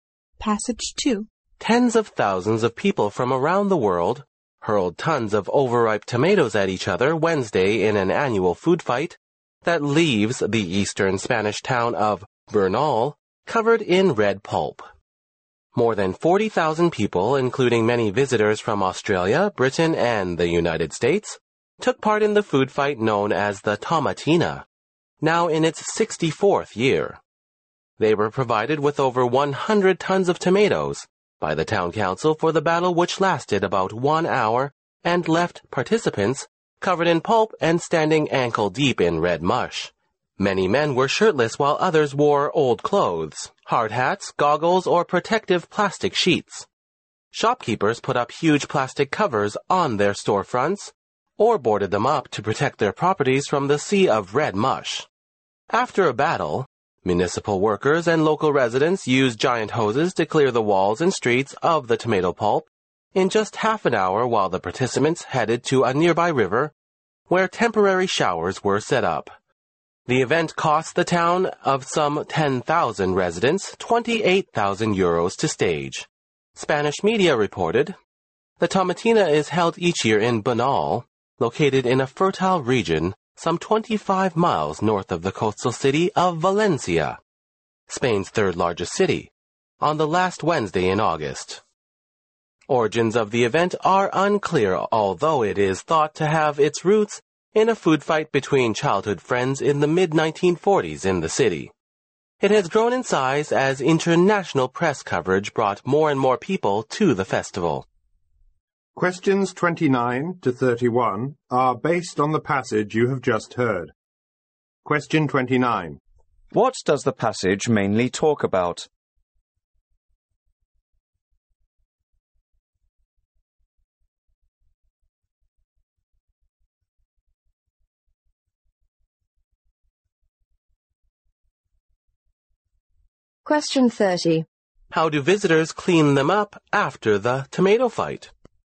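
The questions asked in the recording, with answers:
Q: What does the passage mainly talk about?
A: The Tomatina, Spain's annual tomato fight festival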